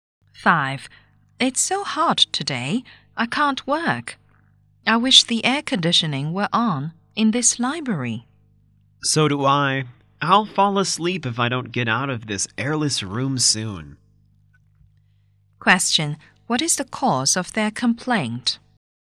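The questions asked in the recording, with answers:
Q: What is the cause of their complaint?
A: It is hot and stuffy in the library because the air conditioning is off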